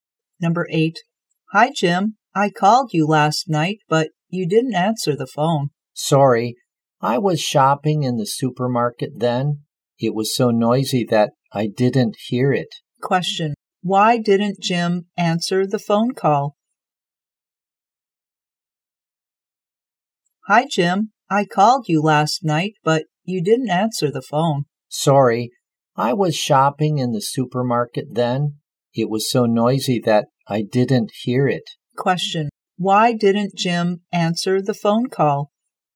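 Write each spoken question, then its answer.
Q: Why didn't Jim answer the phone call?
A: The supermarket was so noisy that he didn't hear it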